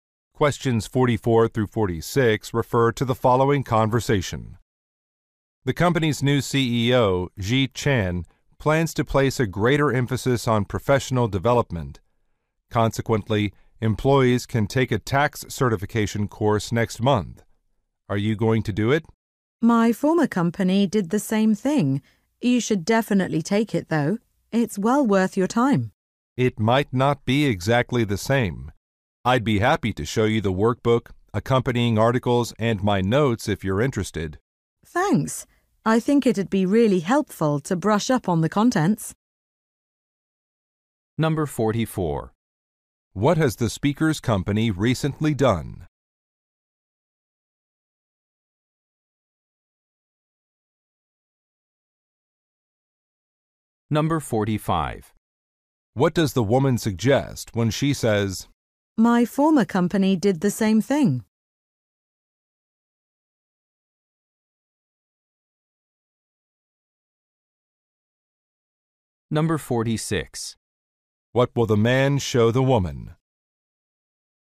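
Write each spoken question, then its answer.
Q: What has the speaker's company recently done?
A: Hired a new CEO

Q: "My former company did the same thing"?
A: She has already taken a similar course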